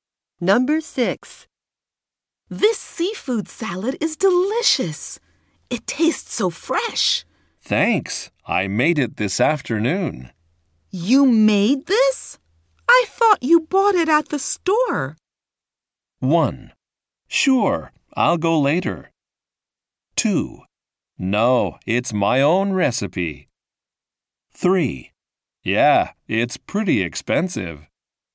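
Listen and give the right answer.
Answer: 2: No, it's my own recipe.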